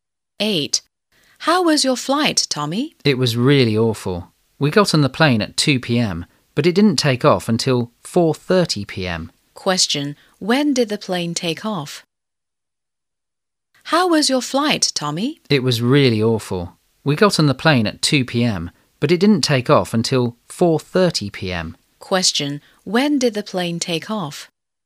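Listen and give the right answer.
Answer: At 4:30 p.m.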